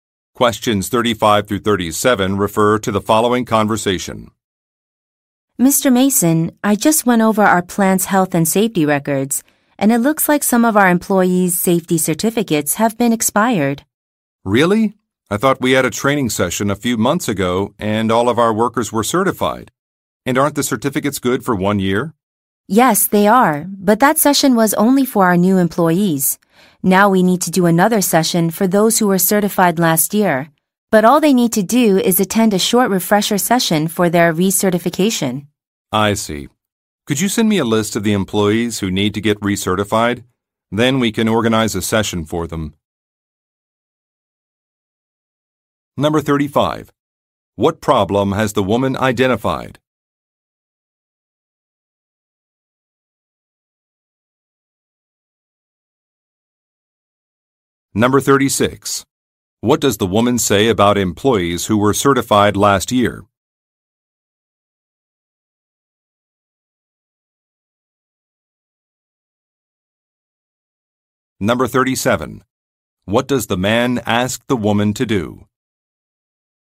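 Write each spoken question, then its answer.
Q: What problem has the woman identified?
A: Some employees' safety certificates have expired.

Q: What does the woman say about employees who were certified last year?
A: They only need to attend a short refresher session to be recertified.

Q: What does the man ask the woman to do?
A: Send him a list of the employees who need to be recertified.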